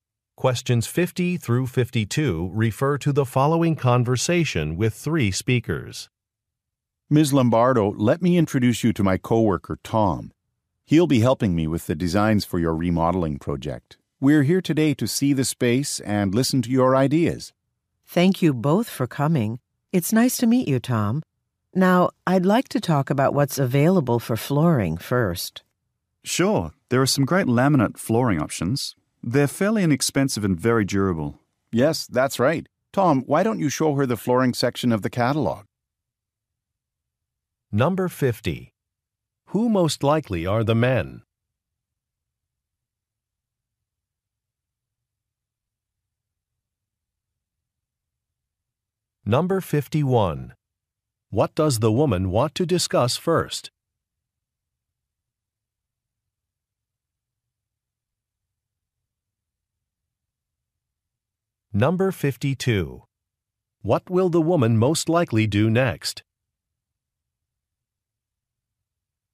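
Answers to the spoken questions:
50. Designers for a remodeling project
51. Flooring
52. Look at the flooring section of a catalog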